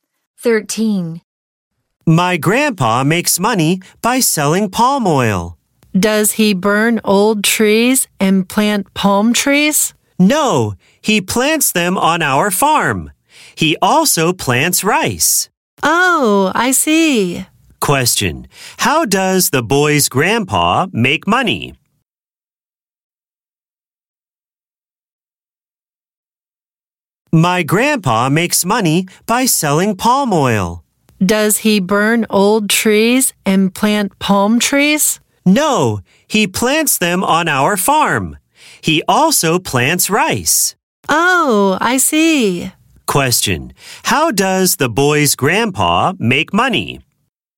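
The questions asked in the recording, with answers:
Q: How does the boy's grandpa make money?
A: By selling palm oil.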